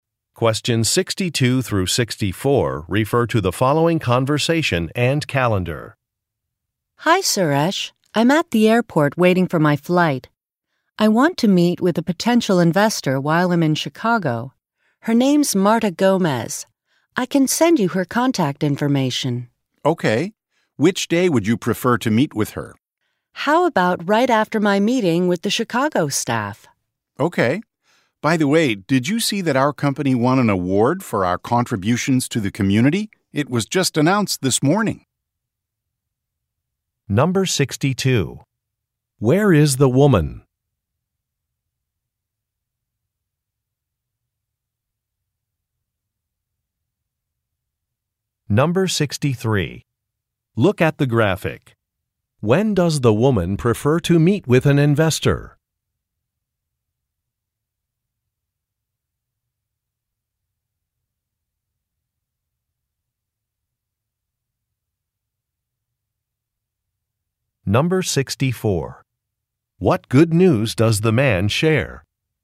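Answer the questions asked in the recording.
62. At the airport
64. Their company won an award for its contributions to the community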